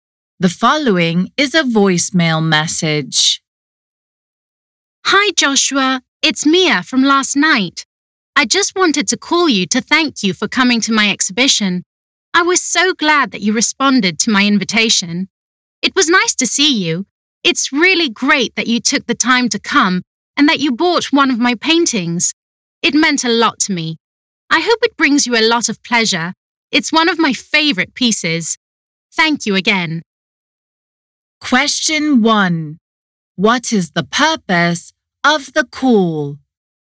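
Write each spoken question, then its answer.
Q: What is the purpose of the call?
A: To thank Joshua for coming to her exhibition and buying a painting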